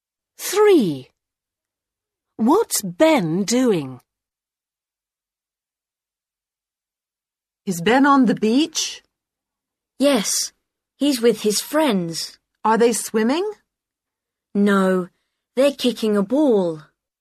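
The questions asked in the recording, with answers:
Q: What's Ben doing?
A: Kicking a ball on the beach with his friends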